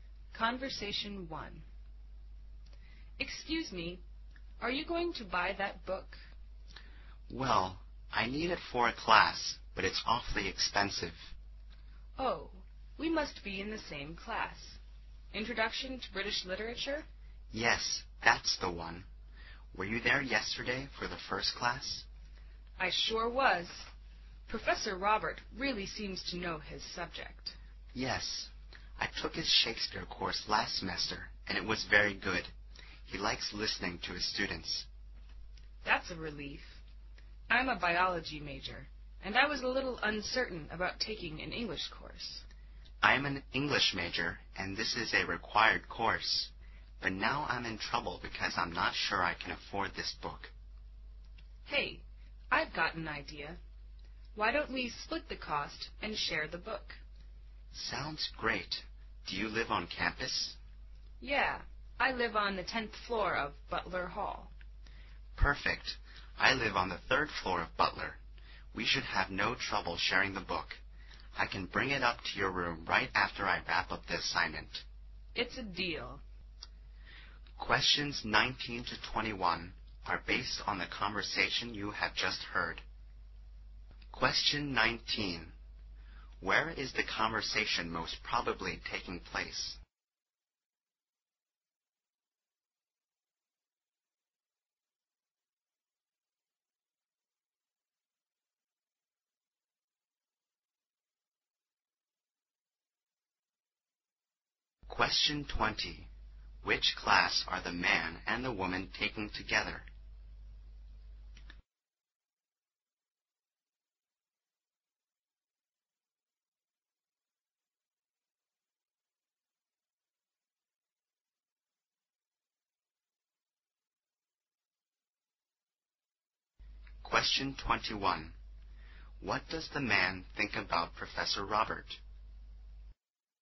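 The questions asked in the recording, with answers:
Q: Which class are the man and the woman taking together?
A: Introduction to British Literature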